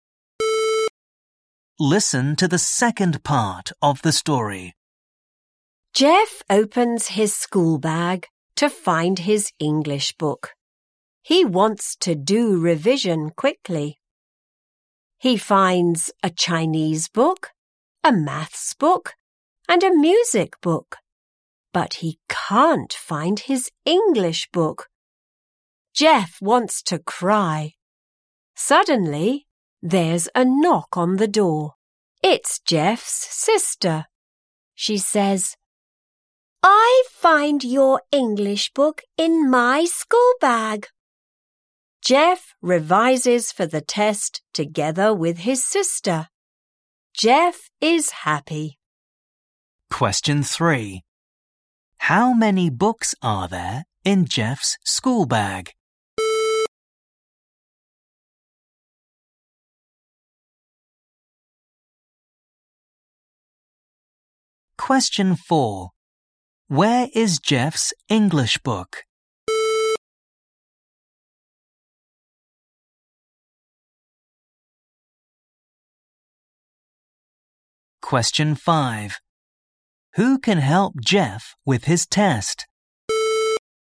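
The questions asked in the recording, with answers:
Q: How many books are there in Jeff's school bag?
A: Three

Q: Where is Jeff's English book?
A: In his sister's school bag

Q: Who can help Jeff with his test?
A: His sister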